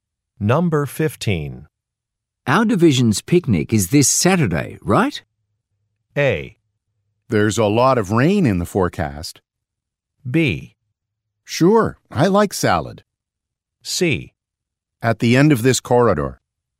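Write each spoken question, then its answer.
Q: Our division's picnic is this Saturday, right?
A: A: There's a lot of rain in the forecast.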